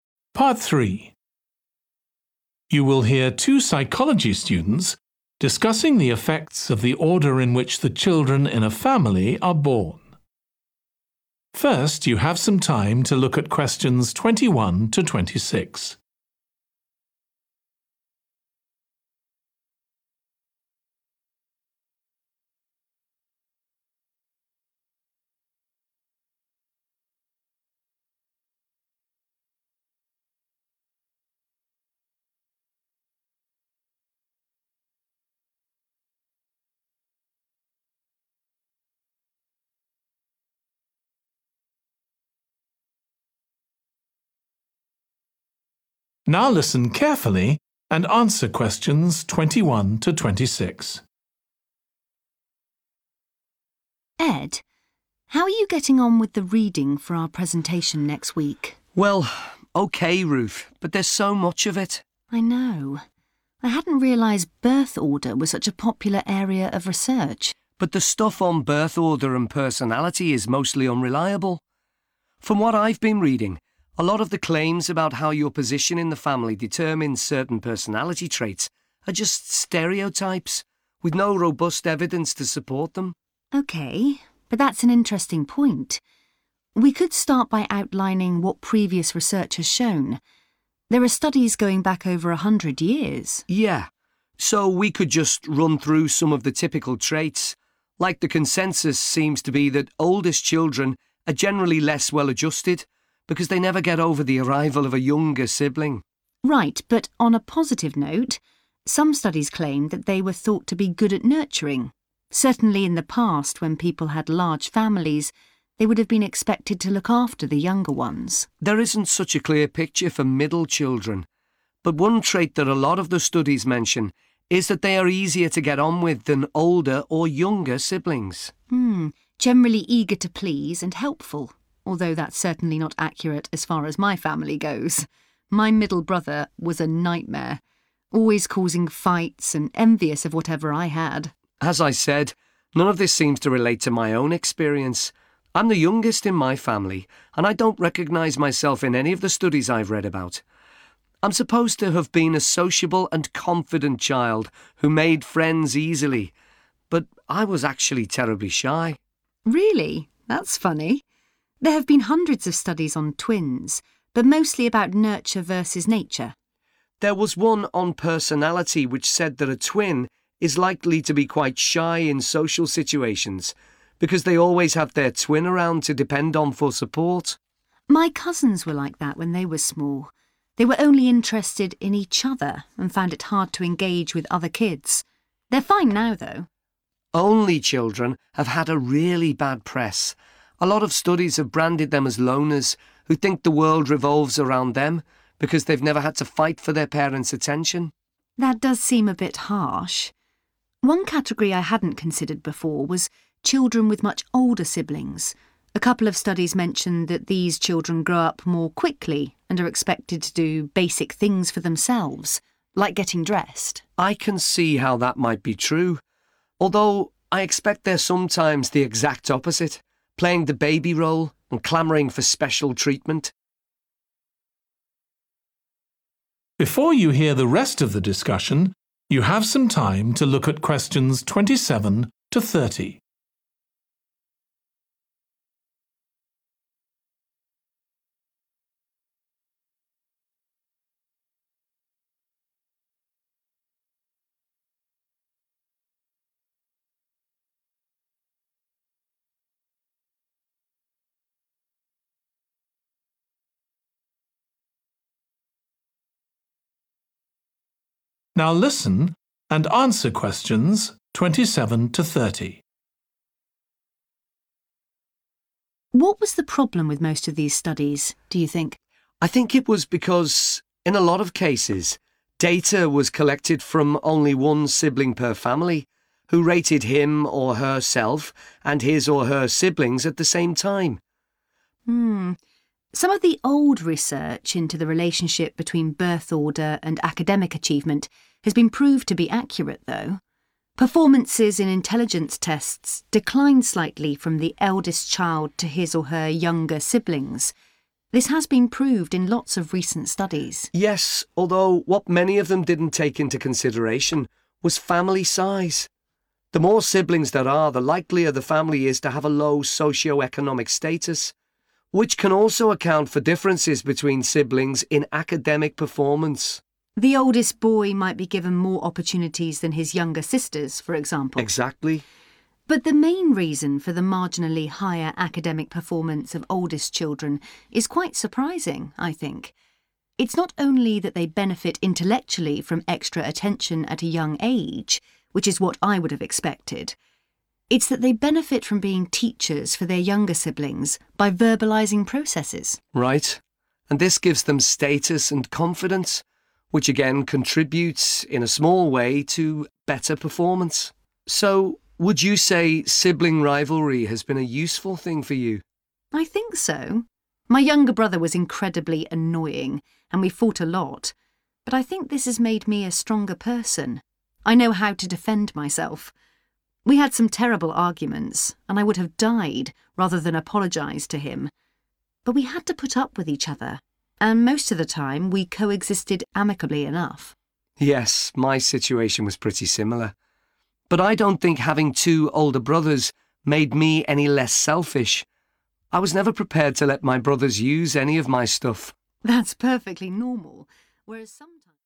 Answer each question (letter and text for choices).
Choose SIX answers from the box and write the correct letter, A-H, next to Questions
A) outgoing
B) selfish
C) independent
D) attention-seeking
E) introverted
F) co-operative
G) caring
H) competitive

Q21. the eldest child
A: G) caring

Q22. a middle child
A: F) co-operative

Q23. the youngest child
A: A) outgoing

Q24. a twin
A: E) introverted

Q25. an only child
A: B) selfish

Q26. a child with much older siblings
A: C) independent

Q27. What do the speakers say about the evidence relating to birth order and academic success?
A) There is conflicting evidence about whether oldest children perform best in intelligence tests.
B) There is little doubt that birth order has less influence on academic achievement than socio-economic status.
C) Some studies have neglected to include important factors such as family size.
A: C) Some studies have neglected to include important factors such as family size.

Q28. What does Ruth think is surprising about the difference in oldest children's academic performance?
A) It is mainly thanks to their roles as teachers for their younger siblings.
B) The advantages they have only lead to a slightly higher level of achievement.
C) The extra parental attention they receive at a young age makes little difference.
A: A) It is mainly thanks to their roles as teachers for their younger siblings.

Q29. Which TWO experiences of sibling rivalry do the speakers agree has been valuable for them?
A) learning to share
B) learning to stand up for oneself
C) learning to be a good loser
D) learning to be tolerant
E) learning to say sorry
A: B) learning to stand up for oneself

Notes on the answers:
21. The transcript suggests that eldest children were believed to be caring and nurturing. They were expected to take care of their younger siblings when families were bigger in the past. Answer Explanation: The answer 'G' means that the eldest child is likely to have caring personality traits. Reason For Correctness: The correct answer is 'G' because the excerpt mentions that eldest children were thought to be good at nurturing and looking after their younger siblings, indicating caring tendencies.
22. The transcript suggests that the child is very willing to make others happy and be useful. Answer Explanation: The answer states that a middle child is likely to be cooperative. Reason For Correctness: The correct answer is 'F' because being eager to please and helpful aligns with the personality trait of being cooperative, which means being willing to work together with others and be helpful and supportive.
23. The transcript suggests that the speaker was a friendly and confident child who found it easy to make friends. Answer Explanation: The answer indicates that the youngest child is likely to be outgoing. Reason For Correctness: The correct answer is 'outgoing' because the speaker's description of being sociable and confident aligns with the personality trait of being outgoing, which is common among youngest children as per previous research findings.
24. The answer choice 'E' means introverted, which suggests being shy or reserved. Reason For Correctness: The correct answer is 'E' because being introverted aligns with being shy in social situations, as mentioned in the excerpt where twins depend on each other for support, potentially leading to shyness in social interactions.
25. The transcript talks about how only children are often unfairly labeled as loners who are self-centered because they haven't had to compete for their parents' attention. Answer Explanation: The answer 'B' indicates that an only child is likely to be selfish. Reason For Correctness: The correct answer is 'B' because the excerpt mentions that only children are sometimes seen as self-centered as they haven't had to vie for their parents' attention, thus portraying a selfish trait.
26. The transcript talks about children with much older siblings. It mentions that these children tend to grow up quickly and are expected to do basic things for themselves, like getting dressed. Answer Explanation: The answer 'C - independent' suggests that a child with much older siblings is likely to be independent. Reason For Correctness: The correct answer is 'C - independent' because the excerpt states that children with much older siblings are expected to do basic things for themselves, indicating independence as a personality trait they are likely to have.
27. The transcript is mentioning that many studies did not consider the size of the family when looking at birth order and academic success. Answer Explanation: The answer suggests that some studies did not include important factors like family size when examining birth order and academic achievements. Reason For Correctness: The correct answer is 'C' because the excerpt points out that some studies neglected to include factors such as family size when studying birth order and academic success, supporting the idea presented in answer choice 'C'.
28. The transcript suggests that the oldest children benefit academically because they act as teachers to their younger siblings by explaining processes out loud. Answer Explanation: The answer suggests that Ruth believes the main reason for the surprising difference in academic performance is that oldest children act as teachers for their younger siblings. Reason For Correctness: The correct answer (A) aligns with the idea presented in the excerpt, which highlights the beneficial role of oldest children as teachers for their younger siblings in improving their academic performance.
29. The transcript shows that the speakers have the ability to protect themselves, and they mention that they had to live with each other peacefully most of the time. Answer Explanation: The answer means that the experiences of learning to stand up for oneself (B) and learning to be tolerant (D) in sibling rivalry have been beneficial for the speakers. Reason For Correctness: The correct answer is B (learning to stand up for oneself) and D (learning to be tolerant) because the speakers refer to knowing how to defend themselves, which relates to standing up for oneself, and to coexisting peacefully most of the time, which indicates being tolerant of each other.

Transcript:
RUTH: Ed, how are you getting on with the reading for our presentation next week?
ED: Well, OK, Ruth – but there's so much of it.
RUTH: I know, I hadn't realised birth order was such a popular area of research.
ED: But the stuff on birth order and personality is mostly unreliable. From what I've been reading a lot of claims about how your position in the family determines certain personality traits are just stereotypes, with no robust evidence to support them.
RUTH: OK, but that's an interesting point – we could start by outlining what previous research has shown. There are studies going back over a hundred years.
ED: Yeah – so we could just run through some of the typical traits. Like the consensus seems to be that oldest children are generally less well-adjusted because they never get over the arrival of a younger sibling.
RUTH: Right, but on a positive note, some studies claimed that they were thought to be good a nurturing – certainly in the past when people had large families they would have been expected to look after the younger ones.
ED: There isn't such a clear picture for middle children – but one trait that a lot of the studies mention is that they are easier to get on with than older or younger siblings.
RUTH: Generally eager to please and helpful – although that's certainly not accurate as far as my family goes – my middle brother was a nightmare – always causing fights and envious of whatever I had.
ED: As I said – none of this seems to relate to my own experience. I'm the youngest in my family and I don't recognise myself in any of the studies I've read about. I'm supposed to have been a sociable and confident child who made friends easily – but I was actually terribly shy.
RUTH: Really? That's funny. There have been hundreds of studies on twins but mostly about nurture versus nature...
ED: There was one on personality, which said that a twin is likely to be quite shy in social situations because they always have their twin around to depend on for support.
RUTH: My cousins were like that when they were small – they were only interested in each other and found it hard to engage with other kids. They're fine now though.
ED: Only children have had a really bad press – a lot of studies have branded them as loners who think the world revolves around them because they've never had to fight for their parents' attention.
RUTH: That does seem a bit harsh. One category I hadn't considered before was children with much older siblings – a couple of studies mentioned that these children grow up more quickly and are expected to do basic things for themselves – like getting dressed.
ED: I can see how that might be true – although I expect they're sometimes the exact opposite – playing the baby role and clamouring for special treatment.
RUTH: What was the problem with most of these studies, do you think?
ED: I think it was because in a lot of cases data was collected from only one sibling per family, who rated him or herself and his or her siblings at the same time.
Some of the old research into the relationship between birth order and academic achievement has been proved to be accurate though. Performances in intelligence tests decline slightly from the eldest child to his or her younger siblings. This has been proved in lots of recent studies.
ED: Yes. Although what many of them didn't take into consideration was family size. The more siblings there are, the likelier the family is to have a low socioeconomic status – which can also account for differences between siblings in academic performance.
RUTH: The oldest boy might be given more opportunities than his younger sisters, for example.
ED: Exactly.
RUTH: But the main reason for the marginally higher academic performance of oldest children is quite surprising, I think. It's not only that they benefit intellectually from extra attention at a young age – which is what I would have expected. It's that they benefit from being teachers for their younger siblings, by verbalising processes.
ED: Right, and this gives them status and confidence, which again contribute, in a small way, to better performance.
So would you say sibling rivalry has been a useful thing for you?
RUTH: I think so – my younger brother was incredibly annoying and we found a lot but I think this has made me a stronger person. I know how to defend myself. We had some terrible arguments and I would have died rather than apologise to him – but we had to put up with each other and most of the time we co-existed amicably enough.
ED: Yes, my situation was pretty similar. But I don't think having two older brothers made me any less selfish – I was never prepared to let me brothers use any of my stuff ...
RUTH: That's perfectly normal, whereas ...